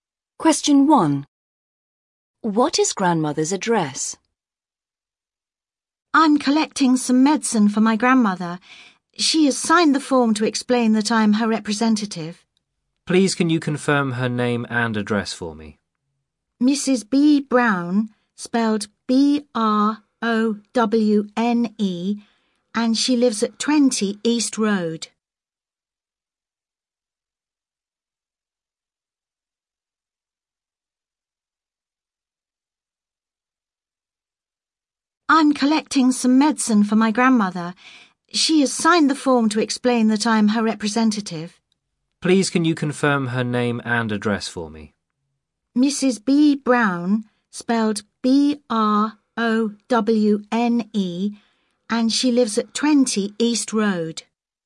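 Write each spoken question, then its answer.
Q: What is grandmother's address?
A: 20 East Road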